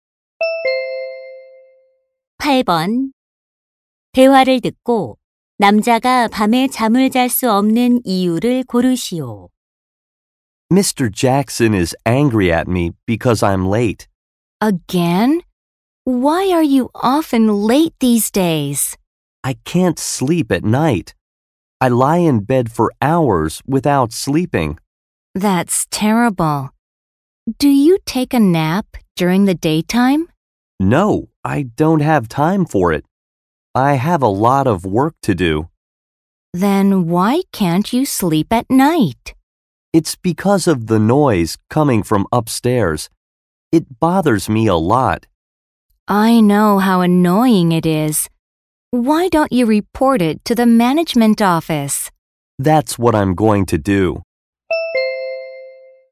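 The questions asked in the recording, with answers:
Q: 대화를 듣고 남자가 밤에 잠을 잘 수 없는 이유를 고르시오.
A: 위층 소음 때문에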